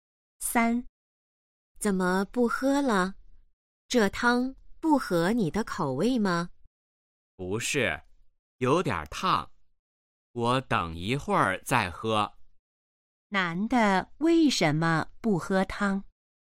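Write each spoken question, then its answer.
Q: 男的为什么不喝汤?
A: 汤有点烫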